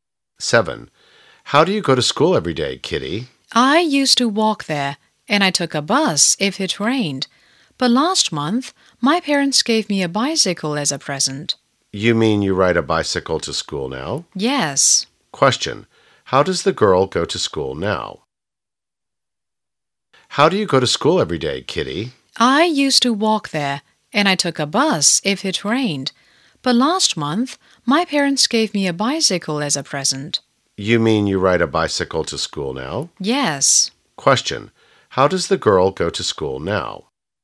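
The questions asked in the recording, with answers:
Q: How does the girl go to school now?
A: By bicycle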